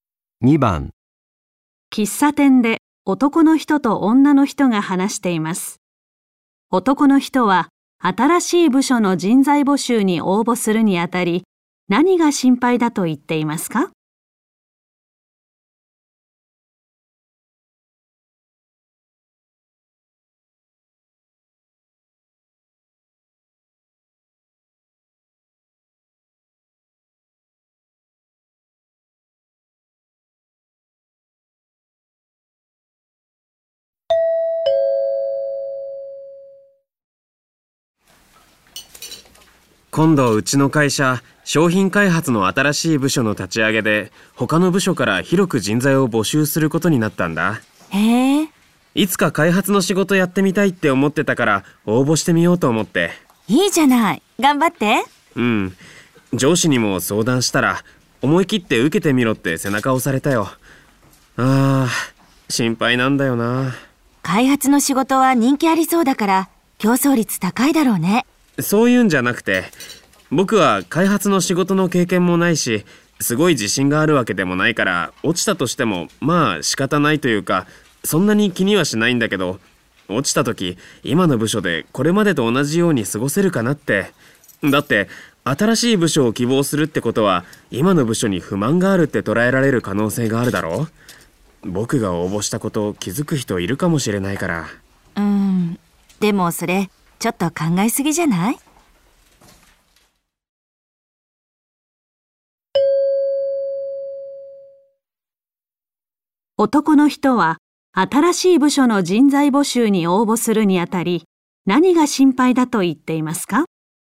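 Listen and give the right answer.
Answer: 落ちた時、今の部署に不満があると思われて、今までどおり過ごせないかもしれないこと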